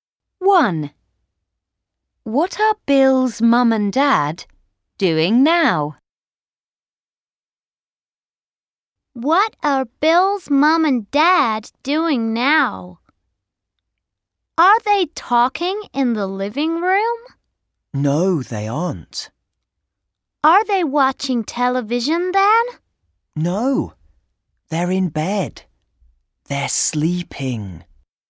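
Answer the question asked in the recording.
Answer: They're sleeping in bed.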